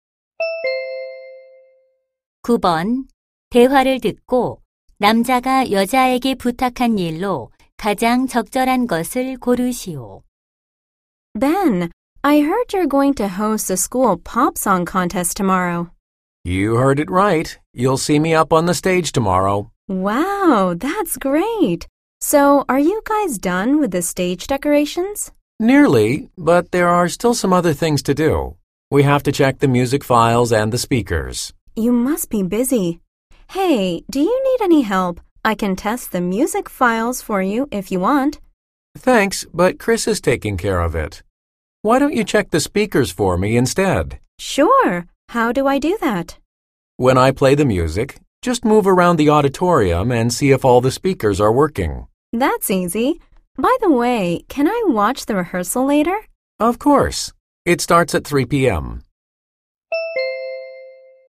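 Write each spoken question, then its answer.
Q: 대화를 듣고 남자가 여자에게 부탁한 일로 가장 적절한 것을 고르시오.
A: 강당의 스피커가 작동하는지 확인하기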